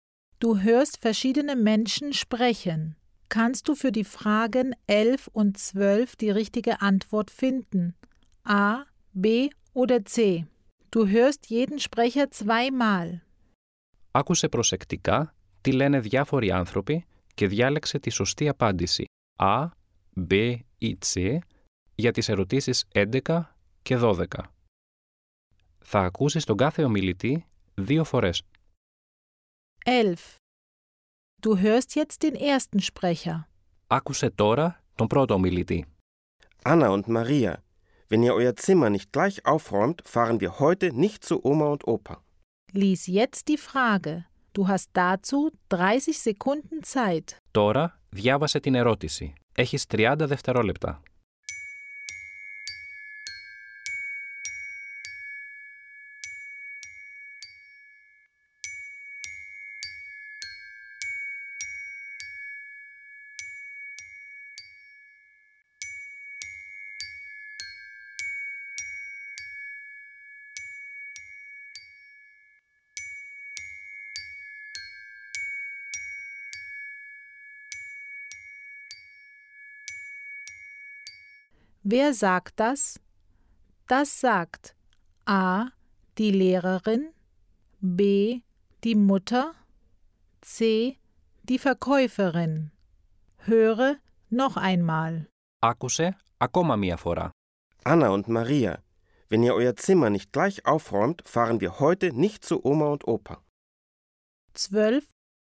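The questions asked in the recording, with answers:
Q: Wer sagt das?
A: B: die Mutter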